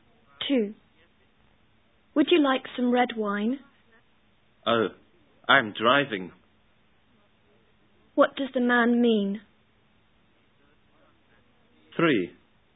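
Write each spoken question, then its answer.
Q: What does the man mean?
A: He can't drink wine because he is driving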